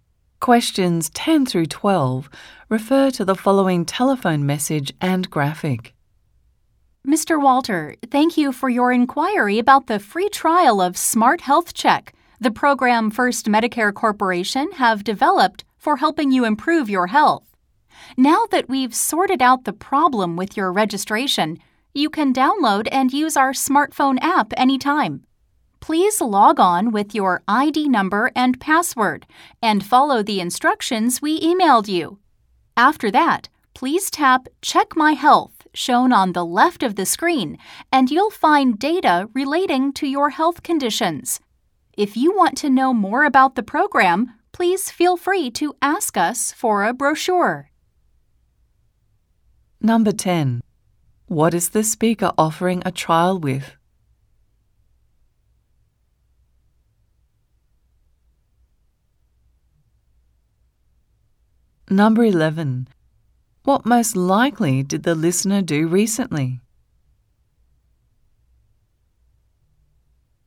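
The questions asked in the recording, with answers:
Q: What is the speaker offering a trial with?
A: A health program called Smart Health Check (a smartphone app)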